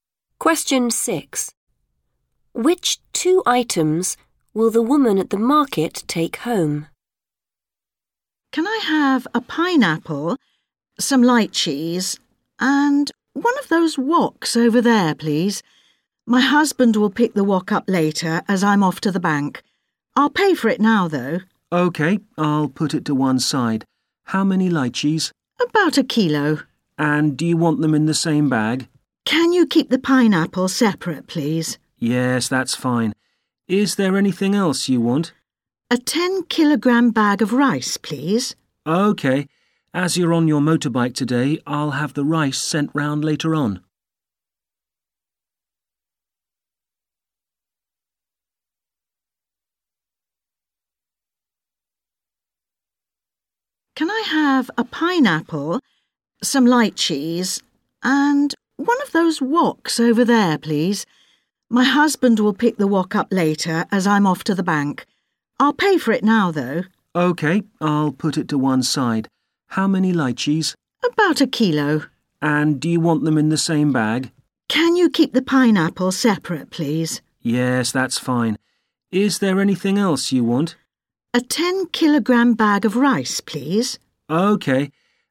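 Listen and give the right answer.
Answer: pineapple and lychees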